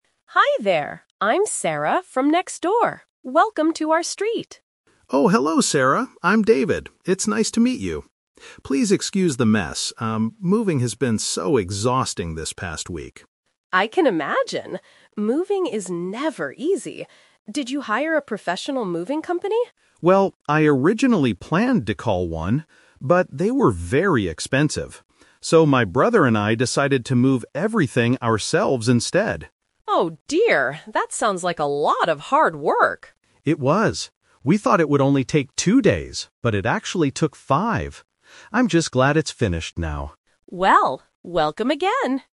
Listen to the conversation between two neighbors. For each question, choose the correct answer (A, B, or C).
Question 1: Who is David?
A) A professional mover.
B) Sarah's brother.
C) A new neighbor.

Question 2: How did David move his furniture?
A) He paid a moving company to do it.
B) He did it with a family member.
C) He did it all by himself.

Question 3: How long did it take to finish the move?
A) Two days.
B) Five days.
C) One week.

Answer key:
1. C) A new neighbor.
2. B) He did it with a family member.
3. B) Five days.

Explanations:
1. Sarah says "Welcome to our street" and David introduces himself as the person moving in, which makes him the new neighbor. Option B is a trap because David mentions his brother, but they are not Sarah's brother.
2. David mentions he "originally planned" to hire professionals (Option A - Trap), but because it was expensive, he and his brother (family member) did it "ourselves instead" (Option B - Key). Option C is wrong because he had help from his brother.
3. David says they "thought it would only take two days" (Option A - Trap), but then uses the word "but" to introduce the reality: "it actually took five" (Option B - Key). Option C is a distractor because he mentioned "this past week", but the specific number of days was five.

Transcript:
Mrs. Green: Hi there! I'm Sarah from next door. Welcome to our street!
Clark: Oh, hello Sarah! I'm David. It's nice to meet you. Please excuse the mess, um... moving has been so exhausting this past week.
Green: I can imagine! Moving is never easy. Did you hire a professional moving company?
Clark: Well, I originally planned to call one. But, they were very expensive. So, my brother and I decided to move everything ourselves instead.
Mrs. Green: Oh dear, that sounds like a lot of hard work!
Clark: It was! We thought it would only take two days, but it actually took five. I'm just glad it's finished now.

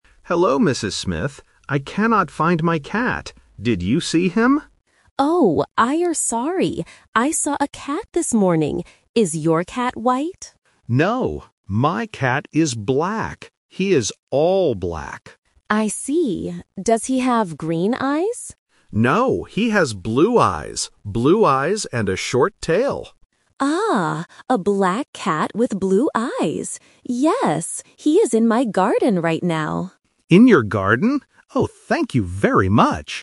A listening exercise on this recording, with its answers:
Listen to the conversation between a pet owner and a neighbor. Choose the correct answer (A, B, or C).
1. What color is the owner's cat?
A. White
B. Black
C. Brown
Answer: B. Black

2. What color are the cat's eyes?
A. Blue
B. Green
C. Black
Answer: A. Blue

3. Where is the cat now?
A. In the house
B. In the park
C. In the garden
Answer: C. In the garden

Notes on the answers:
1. The owner says, "No, my cat is black. He is all black." Option A (White) is the trap because the neighbor asks, "Is your cat white?" first. Option C (Brown) is not mentioned.
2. The neighbor asks if the cat has green eyes, but the owner answers, "No, he has blue eyes." Option B (Green) is the trap from the neighbor's question. Option C (Black) is the color of the cat's body, not the eyes.
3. The neighbor says, "Yes, he is in my garden right now." Option A (In the house) and Option B (In the park) are places where a cat can be, but they are not mentioned in the audio.

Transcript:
Owner: Hello, Mrs. Smith. I cannot find my cat. Did you see him?
Neighbor: Oh, I am sorry. I saw a cat this morning. Is your cat white?
Owner: No, my cat is black. He is all black.
Neighbor: I see. Does he have green eyes?
Owner: No, he has blue eyes. Blue eyes and a short tail.
Neighbor: Ah, a black cat with blue eyes! Yes, he is in my garden right now.

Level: A1

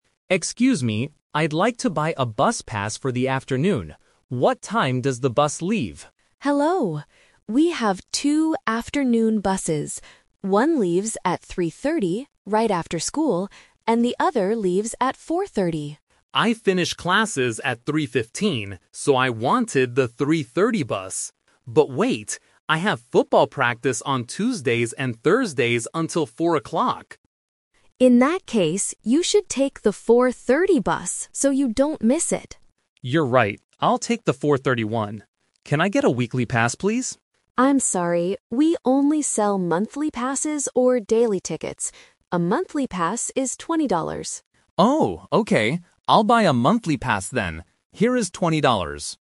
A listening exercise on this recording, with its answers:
Listen to the conversation between a student and a school office staff member about school bus registration, then choose the best answer (A, B, or C) for each question below.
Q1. Which bus is Tom going to take?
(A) The 3:15 bus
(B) The 3:30 bus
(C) The 4:30 bus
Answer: (C) The 4:30 bus

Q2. Why can't Tom take the earlier bus?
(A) His classes finish late.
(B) He has football practice.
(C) He needs to do his homework.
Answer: (B) He has football practice.

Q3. What kind of ticket does Tom buy?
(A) A daily ticket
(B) A weekly pass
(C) A monthly pass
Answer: (C) A monthly pass

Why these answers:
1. After realizing his schedule, Tom says, "I'll take the 4:30 one." Why the traps are wrong: Option (B) is "The Twist Trap". Tom wanted the 3:30 bus at first, but he realizes he has football practice until 4:00. Option (A) is a "Number Trap"; 3:15 is the time his classes finish, not a bus time.
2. Tom explains, "...I have football practice on Tuesdays and Thursdays until 4:00." Why the traps are wrong: Option (A) is the "Rejected Idea". His classes actually finish early (at 3:15). Option (C) is a plausible reason for a student to stay late at school, but it is never mentioned in the audio.
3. Tom agrees with the clerk and says, "I'll buy a monthly pass then." Why the traps are wrong: Option (B) is "The Twist Trap". Tom asks, "Can I get a weekly pass, please?" but the clerk rejects this because they don't sell them. Option (A) is "The Plausible Trap" as it is mentioned by the clerk as an option, but Tom does not choose it.

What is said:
Tom: Excuse me, I'd like to buy a bus pass for the afternoon. What time does the bus leave?
Clerk: Hello! We have two afternoon buses. One leaves at 3:30, right after school, and the other leaves at 4:30.
Tom: I finish classes at 3:15, so I wanted the 3:30 bus. But wait... I have football practice on Tuesdays and Thursdays until 4:00.
Clerk: In that case, you should take the 4:30 bus so you don't miss it.
Tom: You're right. I'll take the 4:30 one. Can I get a weekly pass, please?
Clerk: I'm sorry, we only sell monthly passes or daily tickets. A monthly pass is $20.
Tom: Oh, okay. I'll buy a monthly pass then. Here is twenty dollars.

